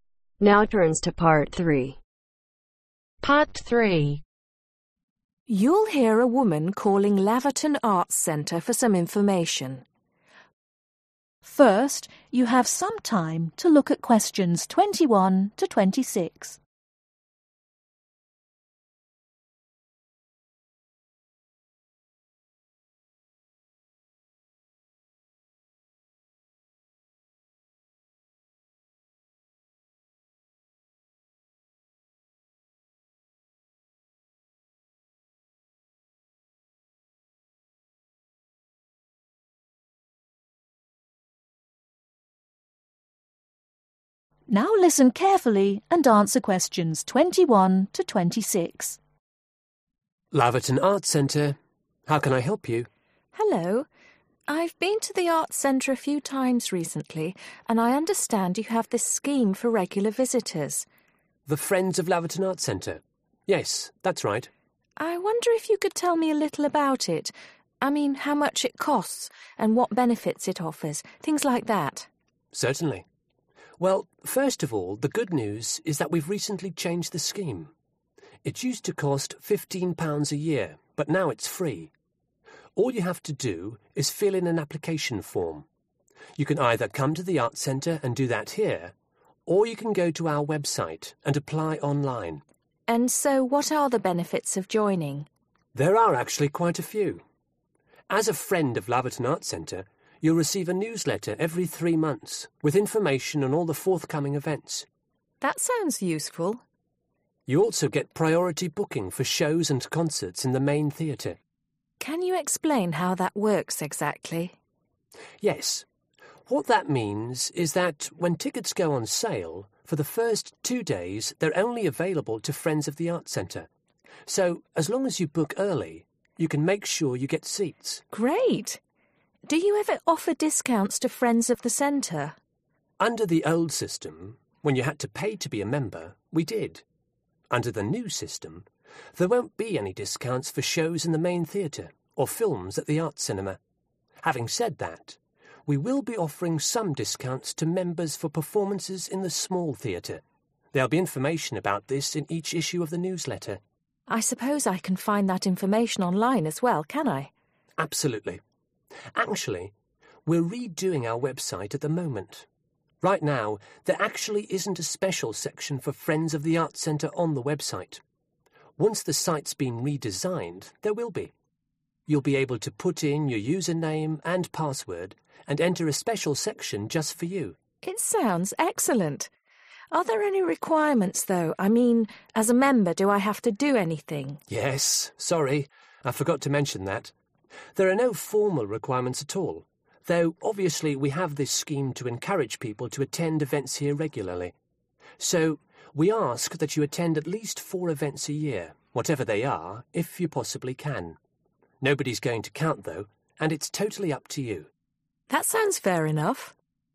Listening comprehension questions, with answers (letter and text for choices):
Choose the correct letter A , B or C.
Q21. Becoming a friend of Laverton Arts Centre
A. costs £15.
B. costs £50.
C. doesn't cost anything.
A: C. doesn't cost anything.

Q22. How many newsletters ,do friends receive each year ?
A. four.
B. one.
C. three.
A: A. four.

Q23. Friends of the Arts centre can buy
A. more tickets than other visitors.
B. tickets before other visitors.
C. books earlier than other visitors.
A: B. tickets before other visitors.

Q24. There might be reductions on tickets for events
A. in the small Theatre.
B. in the Main Theatre.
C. at the Arts Cinema.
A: A. in the small Theatre.

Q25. The Arts Centre is changing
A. the password for its website.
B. its website address.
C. the design of its website.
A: C. the design of its website.

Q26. Friends of Laverton Arts Centre are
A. required to attend a certain number of events.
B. not forced to attend a certain number of events.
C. encouraged to count how many events they attend.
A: B. not forced to attend a certain number of events.